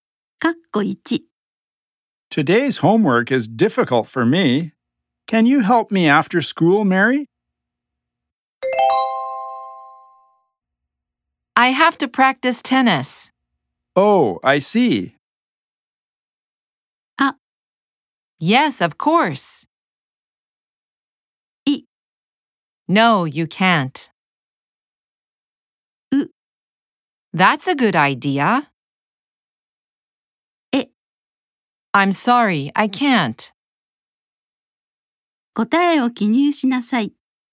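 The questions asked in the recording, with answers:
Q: Can you help me after school, Mary?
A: D: I'm sorry, I can't.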